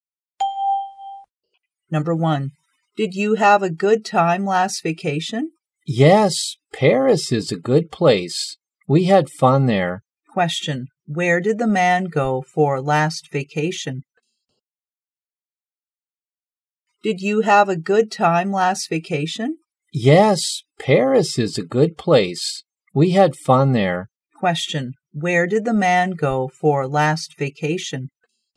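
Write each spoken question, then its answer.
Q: Question, where did the man go for last vacation?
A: Paris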